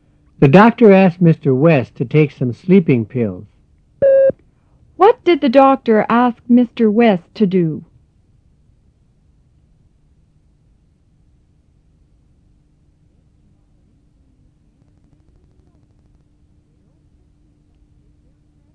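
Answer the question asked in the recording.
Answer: To take some sleeping pills.

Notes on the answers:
The doctor asked Mr. West to take some sleeping pills.

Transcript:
The doctor asked Mr. West to take some sleeping pills. (To take some sleeping pills.) 4.

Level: 入门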